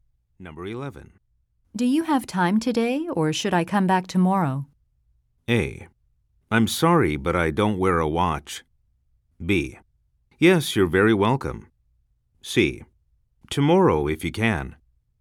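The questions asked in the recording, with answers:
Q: Do you have time today, or should I come back tomorrow?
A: C: Tomorrow, if you can.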